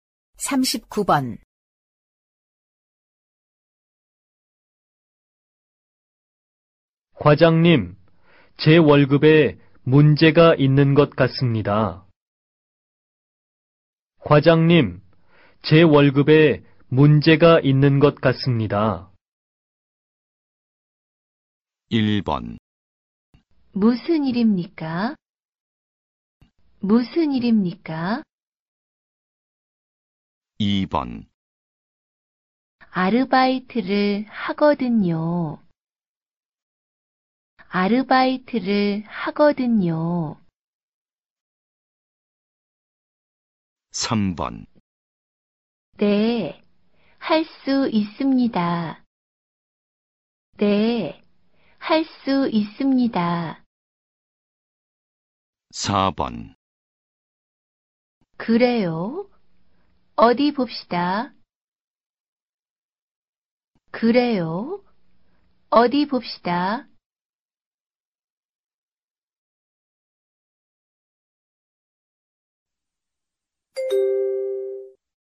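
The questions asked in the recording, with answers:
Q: 과장님, 제 월급에 문제가 있는 것 같습니다.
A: 4: 그래요? 어디 봅시다.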